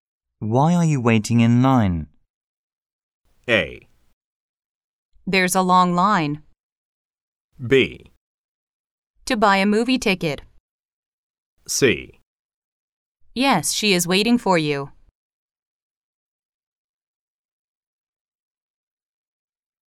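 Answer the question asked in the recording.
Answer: B: To buy a movie ticket.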